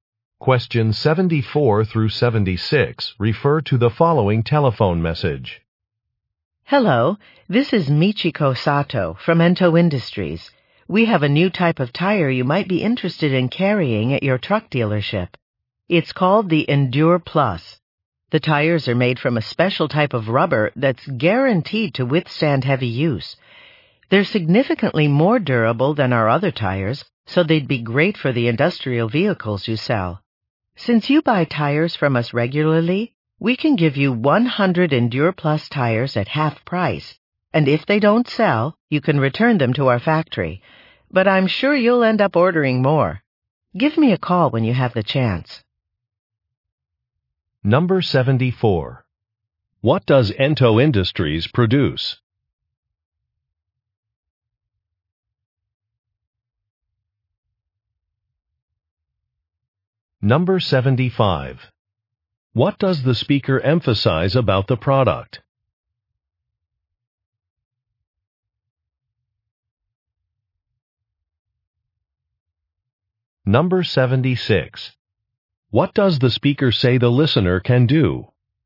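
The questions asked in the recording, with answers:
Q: What does Ento Industries produce?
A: Tires

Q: What does the speaker emphasize about the product?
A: It is very durable

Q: What does the speaker say the listener can do?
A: Return unsold tires to the factory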